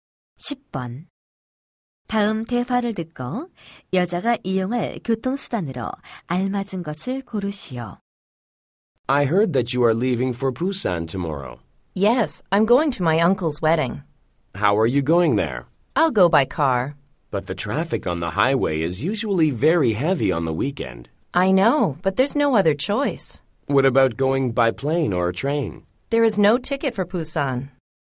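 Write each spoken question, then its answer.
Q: 다음 대화를 듣고 여자가 이용할 교통수단으로 알맞은 것을 고르시오.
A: 자동차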